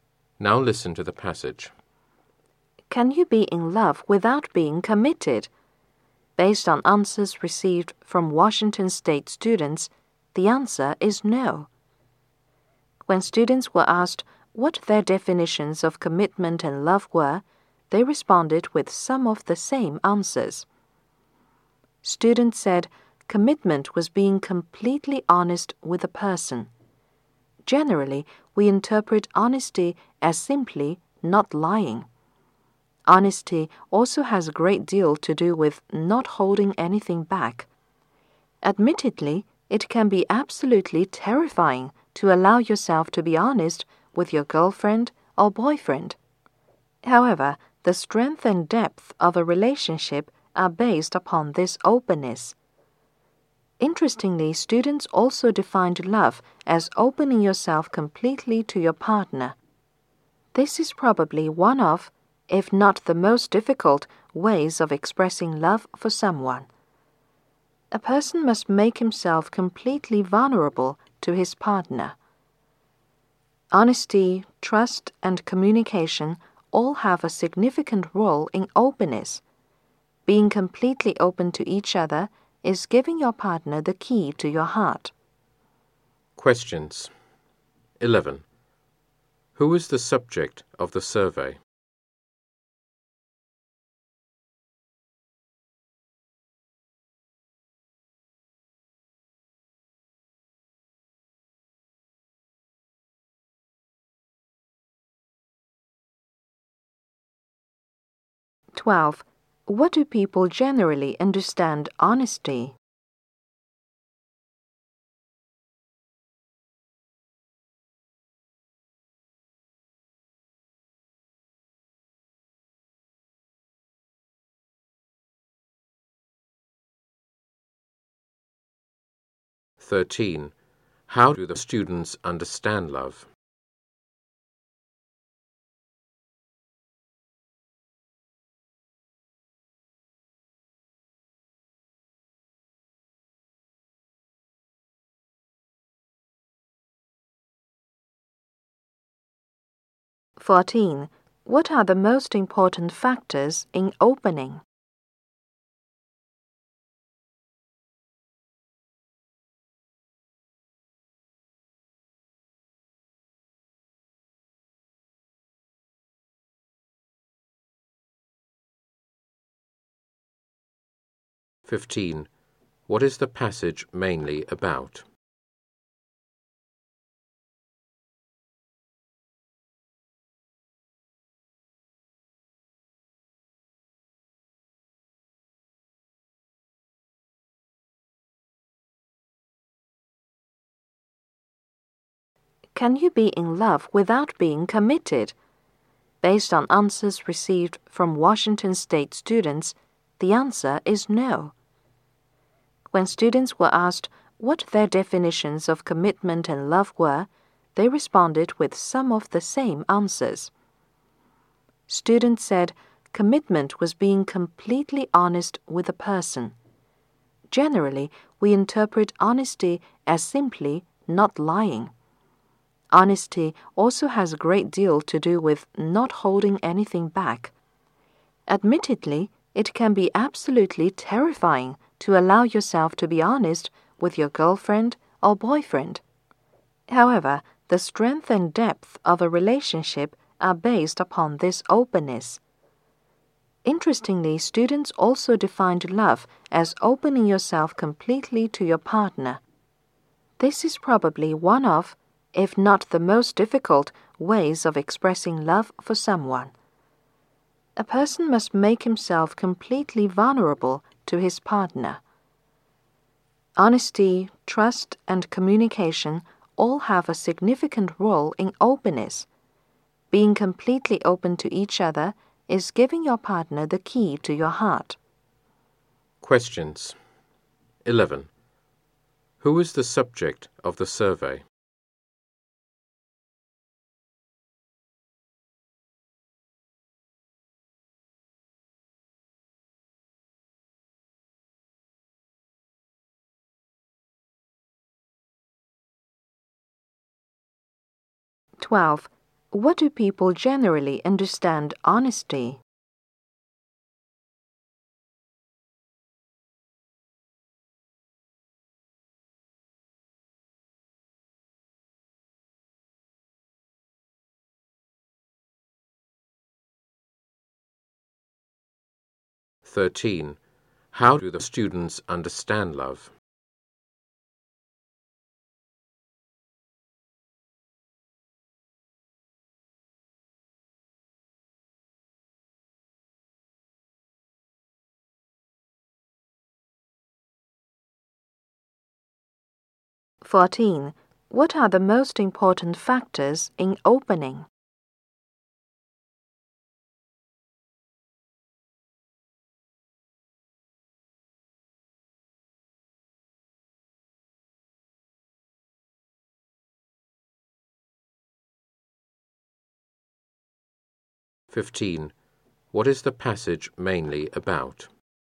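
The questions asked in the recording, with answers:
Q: Who is the subject of the survey?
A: Washington State students

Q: What do people generally understand honesty?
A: Simply not lying

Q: How do the students understand love?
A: Opening yourself completely to your partner

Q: What are the most important factors in opening?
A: Honesty, trust and communication

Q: What is the passage mainly about?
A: Commitment and love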